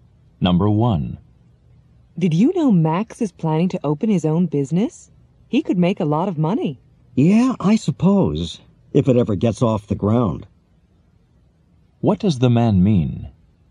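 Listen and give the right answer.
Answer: He doubts Max's business will ever get started.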